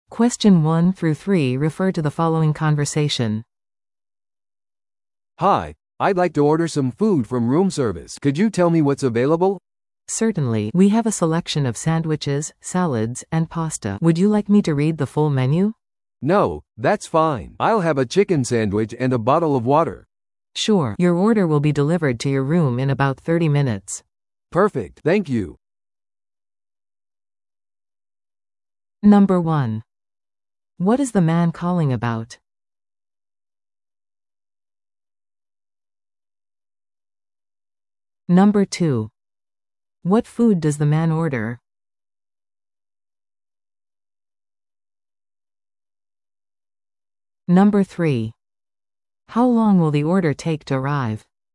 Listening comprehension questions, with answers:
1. What is the man calling about?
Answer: ルームサービスを注文するため

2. What food does the man order?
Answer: チキンサンドイッチと水

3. How long will the order take to arrive?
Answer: 30分

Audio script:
Hotel room service
A: "Hi, I'd like to order some food from room service. Could you tell me what's available?"
B: "Certainly. We have a selection of sandwiches, salads, and pasta. Would you like me to read the full menu?"
A: "No, that's fine. I'll have a chicken sandwich and a bottle of water."
B: "Sure. Your order will be delivered to your room in about 30 minutes."
A: "Perfect. Thank you!"